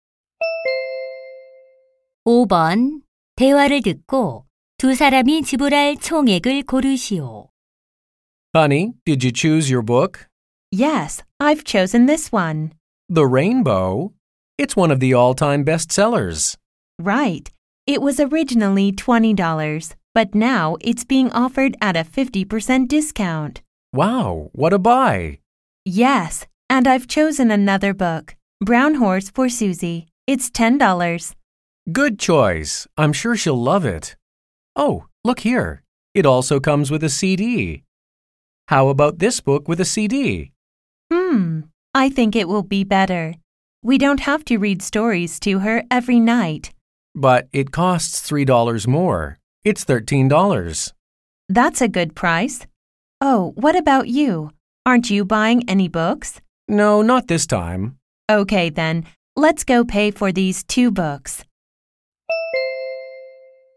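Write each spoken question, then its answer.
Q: 대화를 듣고 두 사람이 지불할 총액을 고르시오.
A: $23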